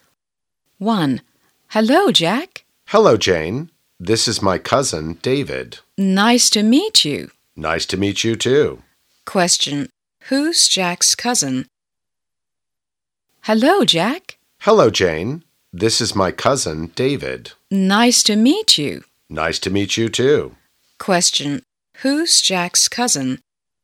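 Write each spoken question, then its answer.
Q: Who's Jack's cousin?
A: David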